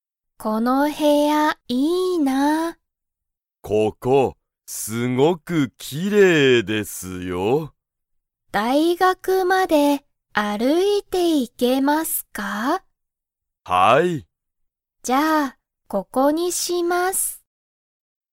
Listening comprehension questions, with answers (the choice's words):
その部屋(へや)は、すごく____。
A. きれいだ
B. かわいい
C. ここだ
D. 速(はや)い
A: きれいだ

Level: Level 1